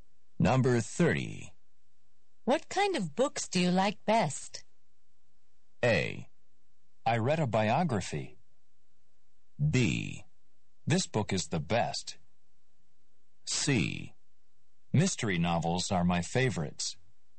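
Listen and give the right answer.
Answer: C: Mystery novels are my favorites.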